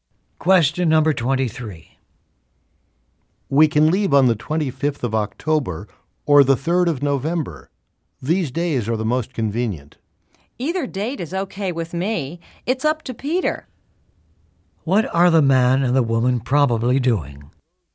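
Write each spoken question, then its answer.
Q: What are the man and the woman probably doing?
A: Planning a trip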